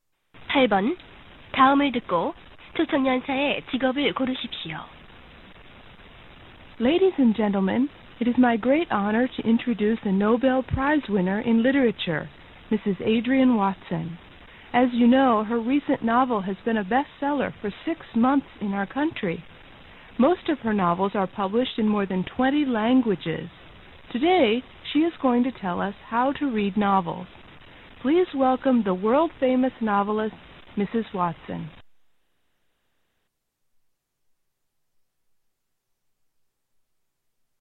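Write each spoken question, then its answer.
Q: 8번 다음을 듣고 초청년사의 직업을 고르십시오.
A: 소설가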